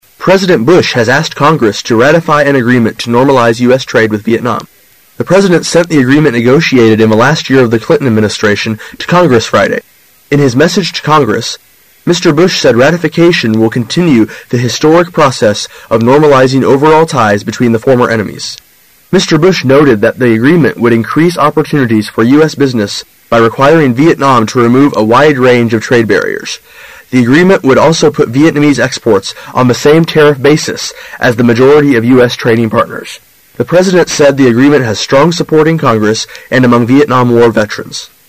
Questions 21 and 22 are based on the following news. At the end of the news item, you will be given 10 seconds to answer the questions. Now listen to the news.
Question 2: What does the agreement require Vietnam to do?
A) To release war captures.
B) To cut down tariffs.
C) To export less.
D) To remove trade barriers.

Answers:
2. D) To remove trade barriers.

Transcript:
[解析] 21-22 President Bush has asked Congress to ratify an agreement to normalize U.S. trade with Vietnam. The president sent the agreement negotiated in the last year of the Clinton administration to Congress Friday. In his message to Congress, Mr. Bush said ratification will continue the historic process of normalizing overall ties between the former enemies. Mr. Bush noted that the agreement would increase opportunities for U. S. business by requiring Vietnam to remove a wide range of trade barriers. The agreement would also put Vietnamese exports on the same tariff basis as the majority of U. S. trading partners. The president said the agreement has strong support in Congress and among Vietnam War veterans.

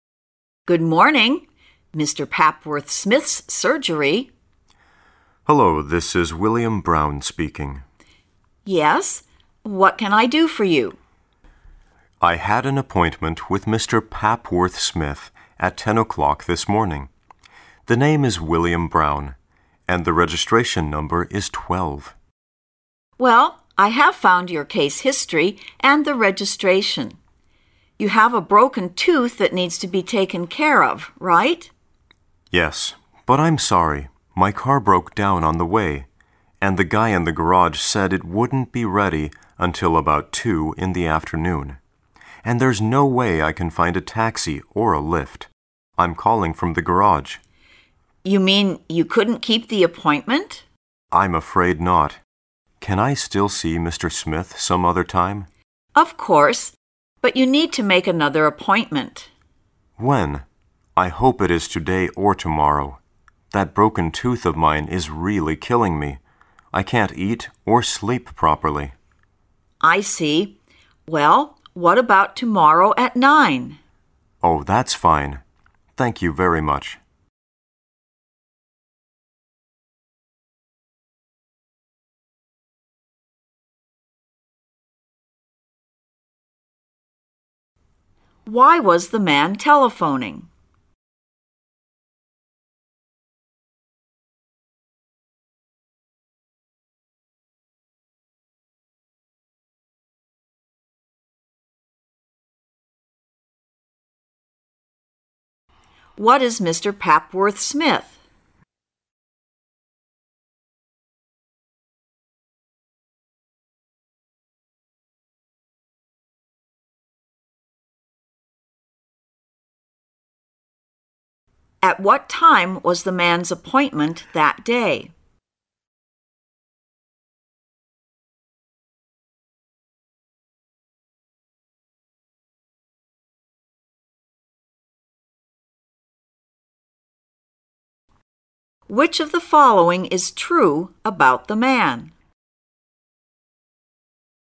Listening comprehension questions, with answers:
Directions: In this part of the test, you will hear several short talks and conversations. After each of these, you will hear a few questions. Listen carefully because you will hear the talk or conversation and questions ONLY ONCE. When you hear a question, read the four answer choices and choose the best answer to that question. Then write the letter of the answer you have chosen in the corresponding space in your ANSWER BOOKLET.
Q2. What is Mr. Papworth Smith?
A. He is a company manager.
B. He is a repairman.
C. He is a taxi driver.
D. He is a dentist.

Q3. At what time was the man's appointment that day?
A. At 9 o'clock.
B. At 10 o'clock.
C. At 12 o'clock.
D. At two in the afternoon.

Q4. Which of the following is TRUE about the man?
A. He had to call a taxi company.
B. He had to eat and sleep in his office.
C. He had to come some other time.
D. He had to report the murder case.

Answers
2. D. He is a dentist.
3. B. At 10 o'clock.
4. C. He had to come some other time.

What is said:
[解析] 11-14 W: Good morning. Mr. Papworth Smith's Surgery. M: Hullo, this is William Brown speaking. W: Yes? What can I do for you? M: I had an appointment with Mr. Papworth Smith at 10:00 this morning. The name is William Brown. And the registration number is 12. W: Well, I have found your case history, and the registration. You have a broken tooth that needs to be taken care of, right? M: Yes, but I'm sorry, my car broke down on the way, and the guy in the garage said it wouldn't be ready until about two in the afternoon. And there's no way I can find a taxi or a lift. I'm calling from the garage. W: You mean you couldn't keep the appointment? M: I'm afraid not. Can I still see Mr. Smith some other time? W: Of course, but you need to make another appointment. M: When? I hope it is today or tomorrow. That broken tooth of mine is really killing me; I can't eat or sleep properly. W: I see. Well, what about tomorrow at nine? M: Oh, that's fine. Thank you very much. Why was the man telephoning?
2.

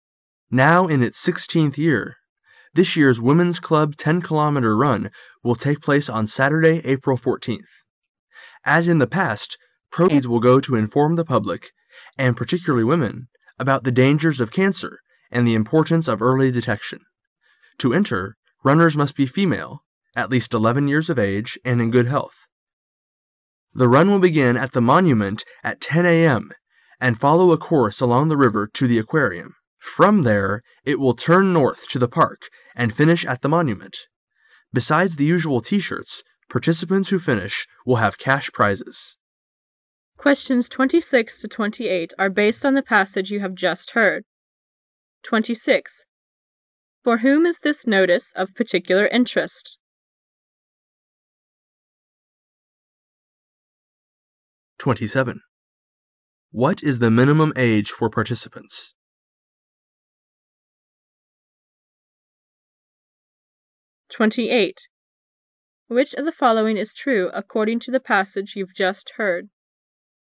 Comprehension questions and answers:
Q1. Which of the following is true according to the passage you've just heard?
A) Anyone who want can participate, including children.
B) Runners should be in good health.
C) Only the champion runner will get money.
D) The final destination for the run is the Aquarium(水族馆).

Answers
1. B) Runners should be in good health.

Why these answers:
[试题分析] 本题考查考生对细节信息的理解能力。 h,participants who finish will have cash prizes,finish at the Monument. [详细解答] 用排除法。对参赛者是有条件限制的,如年龄限制,身体状况限制等,并非你想参加均可,故A错;完成跑步的参赛者将有现金奖励,故C内容太绝对;赛跑终点是纪念馆,故D错。B选项内容已在关键词语中列出,故本题选B。

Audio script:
As in the past, proceeds will go to inform the public, and particularly women, about the dangers of cancer and the importance of early detection. To enter, runners must be female, at least eleven years of age, and in good health. The run will begin at the Monument at ten Pam and follow a course along the river to the Aquarium. Form there it will turn north to the park and finish at the Monument. Besides the usual T-shirts, participants who finish will have cash prizes. 26.For whom is this notice of particular interest?

